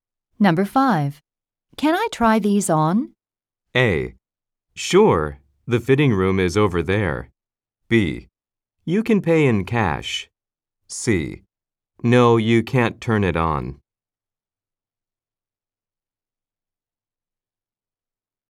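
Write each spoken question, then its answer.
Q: Can I try these on?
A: A: Sure, the fitting room is over there.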